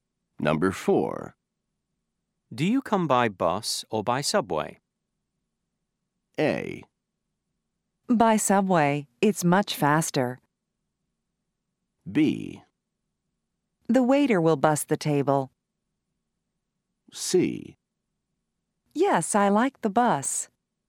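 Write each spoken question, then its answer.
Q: Do you come by bus or by subway?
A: A: By subway, it's much faster.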